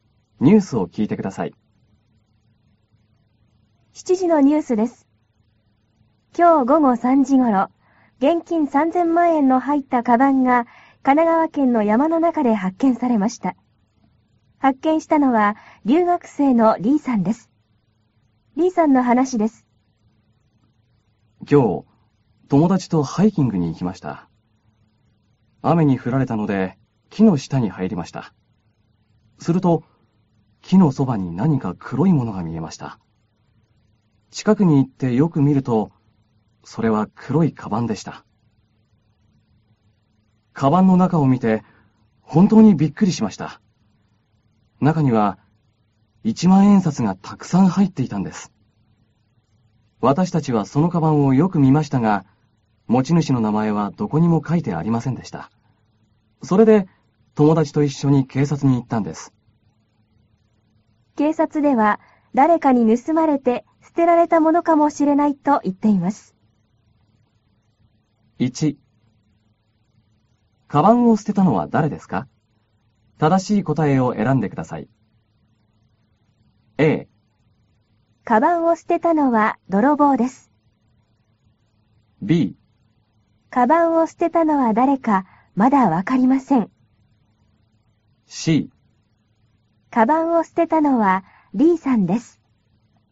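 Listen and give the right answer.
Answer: B: カバンを捨てたのは誰かまだわかりません。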